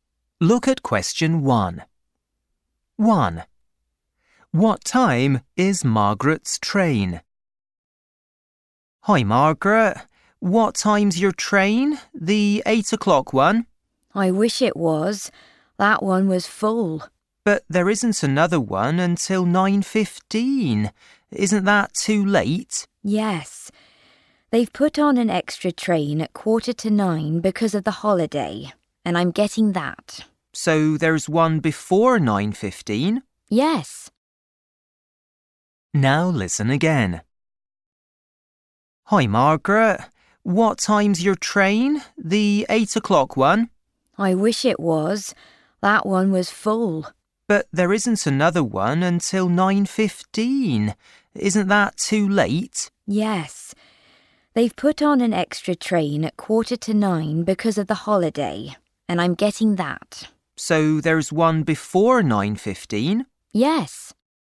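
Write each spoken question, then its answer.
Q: What time is Margaret's train?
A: 8:45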